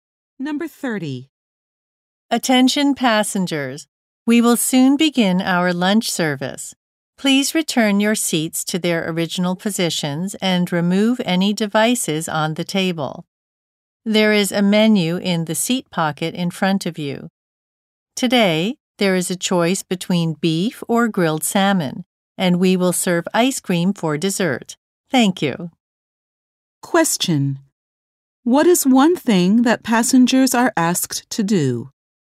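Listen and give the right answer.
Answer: Return their seats to their original positions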